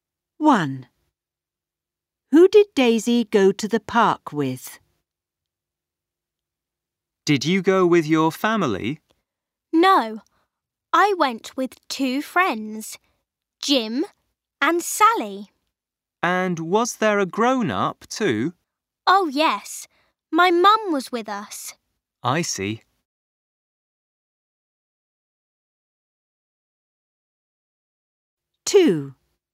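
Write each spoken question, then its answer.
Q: Who did Daisy go to the park with?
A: Two friends, Jim and Sally, and her mum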